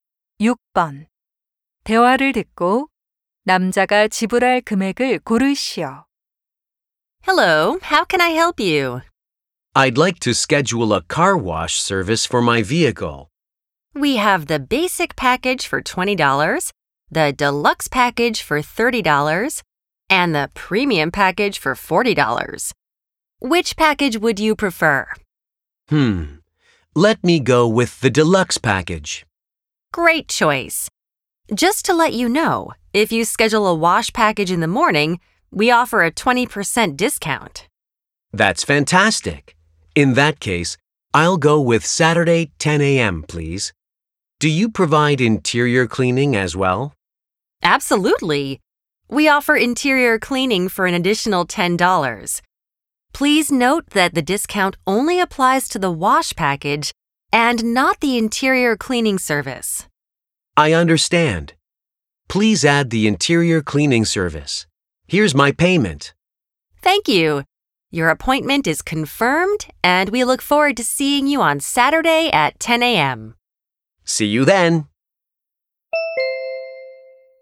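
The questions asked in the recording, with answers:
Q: 대화를 듣고 남자가 지불할 금액을 고르시오.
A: $34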